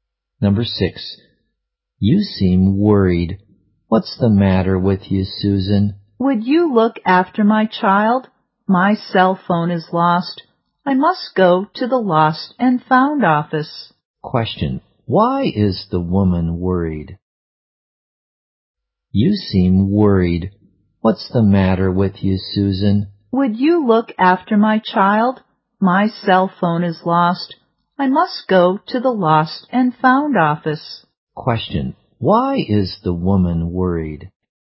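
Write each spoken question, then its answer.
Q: why is the woman worried?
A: Her cell phone is lost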